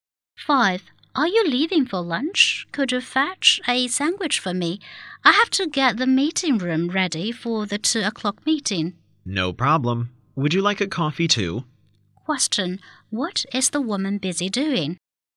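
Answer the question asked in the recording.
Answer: Getting the meeting room ready for a meeting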